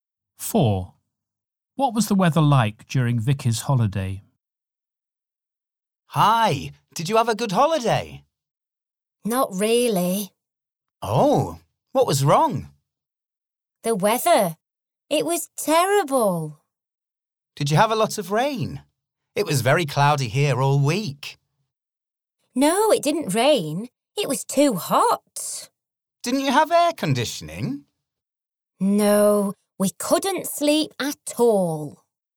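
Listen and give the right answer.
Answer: Very hot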